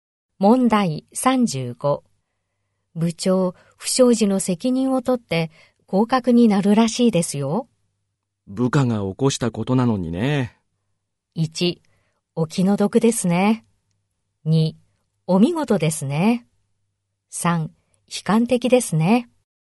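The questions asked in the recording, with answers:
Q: 部長、不祥事の責任を取って降格になるらしいですよ。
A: 1: お気の毒ですね。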